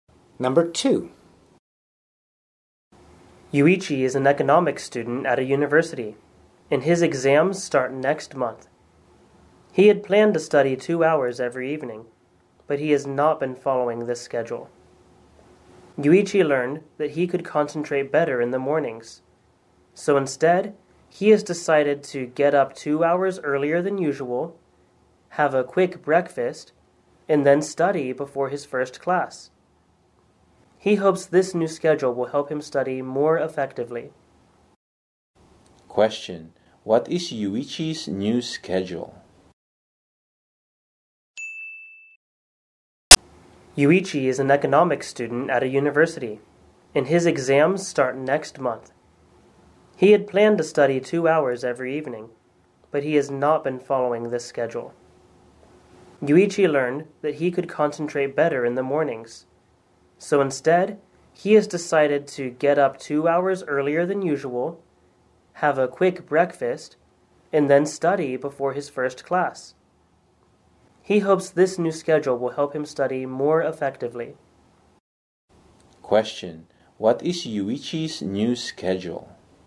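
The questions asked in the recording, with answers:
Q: what is Yuichi's new schedule?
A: Get up 2 hours earlier, have a quick breakfast, then study before his first class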